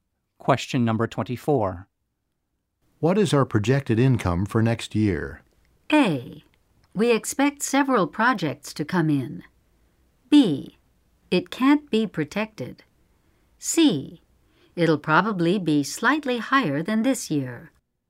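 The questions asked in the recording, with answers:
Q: What is our projected income for next year?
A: C: It'll probably be slightly higher than this year.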